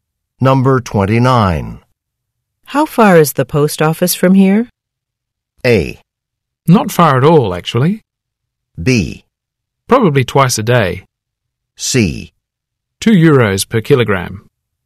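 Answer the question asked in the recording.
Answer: A: Not far at all, actually.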